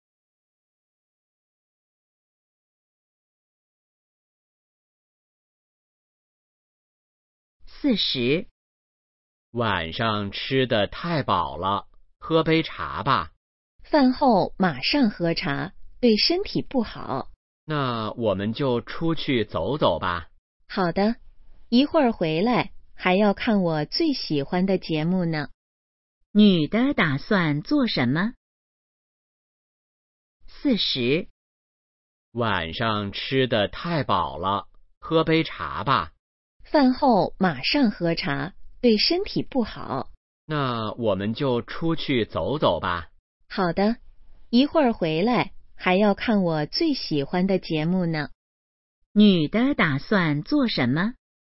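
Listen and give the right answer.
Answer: 出去走走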